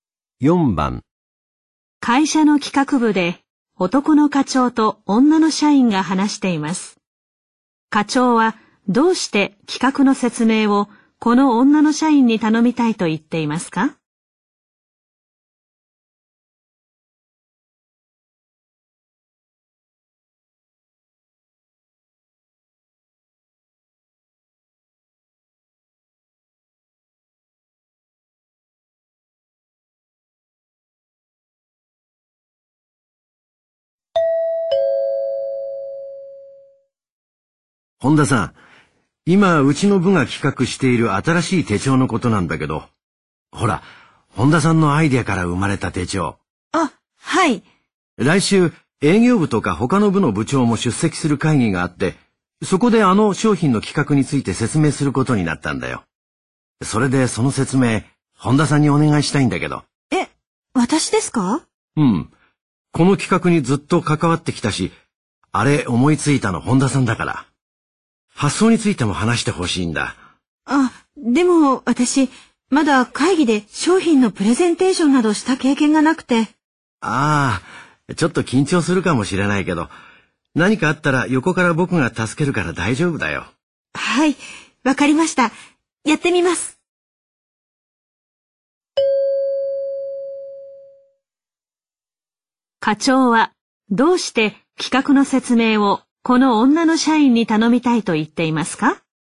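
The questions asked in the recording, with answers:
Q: 課長はどうして企画の説明をこの女の社員に頼みたいと言っていますか?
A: 企画を思いついた本人なので発想についても話してほしいから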